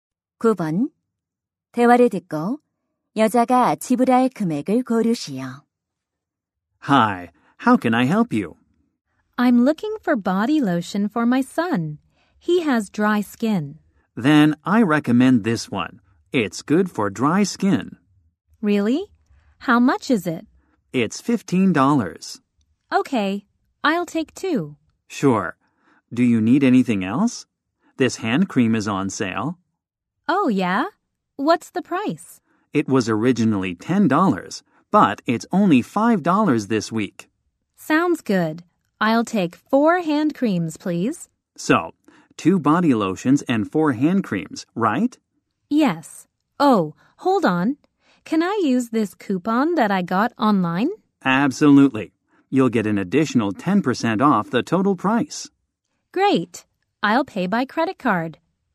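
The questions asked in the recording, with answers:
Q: 대화를 듣고 여자가 지불할 금액을 고르시오.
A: $45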